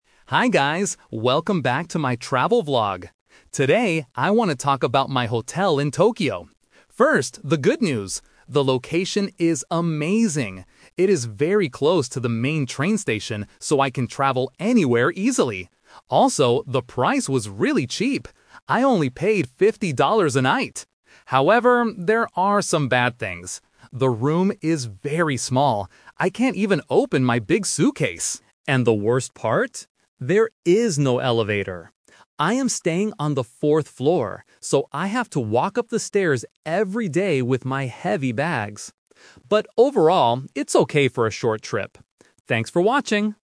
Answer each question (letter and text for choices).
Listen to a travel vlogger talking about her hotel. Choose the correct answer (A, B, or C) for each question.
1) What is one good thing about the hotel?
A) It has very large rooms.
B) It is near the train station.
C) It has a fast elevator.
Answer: B) It is near the train station.

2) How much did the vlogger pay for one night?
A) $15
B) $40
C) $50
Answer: C) $50

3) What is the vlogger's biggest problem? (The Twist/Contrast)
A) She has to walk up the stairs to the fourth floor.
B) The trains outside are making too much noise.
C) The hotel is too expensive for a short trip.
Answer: A) She has to walk up the stairs to the fourth floor.

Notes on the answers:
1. The vlogger clearly states, "It is very close to the main train station..." Trap: Option A is exactly the opposite of the truth (the room is "very small"). Option C is a trap because she complains later that there is "no elevator" at all.
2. She mentions the price clearly: "I only paid $50 a night." Trap: Option A ($15) is a trap using a similar-sounding number (fifteen vs. fifty). Option B ($40) is a trap because the word "fourth" (4th floor) is mentioned later in the audio.
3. This is the Contrast/Twist of the review. After praising the hotel, she says, "And the worst part? There is no elevator... so I have to walk up the stairs every day..." Trap: Option B is a plausible problem for a hotel near a train station, but she never mentions noise. Option C is incorrect because she explicitly said the price was "really cheap."

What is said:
Vlogger: Hi guys, welcome back to my travel vlog! Today, I want to talk about my hotel in Tokyo. First, the good news. The location is amazing! It is very close to the main train station, so I can travel anywhere easily. Also, the price was really cheap. I only paid $50 a night. However, there are some bad things. The room is very small. I can't even open my big suitcase! And the worst part? There is no elevator. I am staying on the fourth floor, so I have to walk up the stairs every day with my heavy bags. But overall, it's okay for a short trip. Thanks for watching!